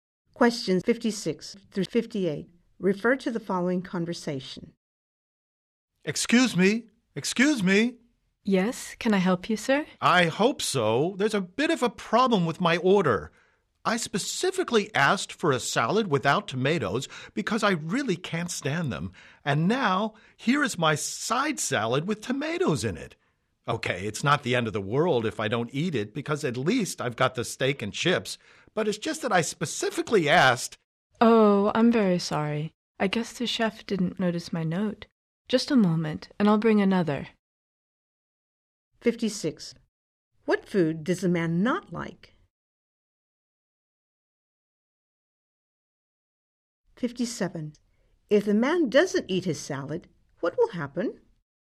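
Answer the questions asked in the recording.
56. Tomatoes
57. Nothing serious; he still has the steak and chips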